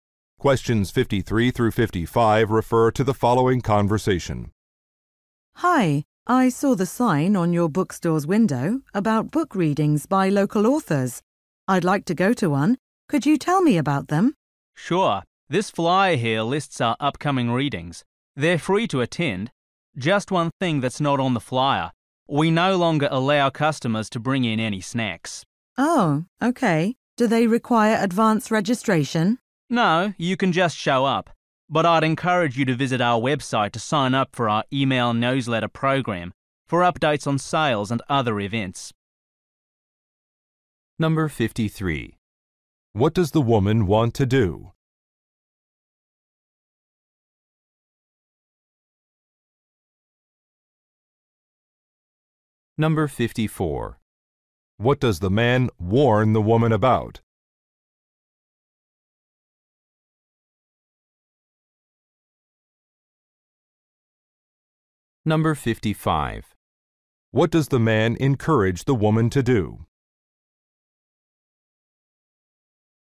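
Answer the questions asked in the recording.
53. Attend a book reading.
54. Snacks are no longer allowed.
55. Sign up for the email newsletter.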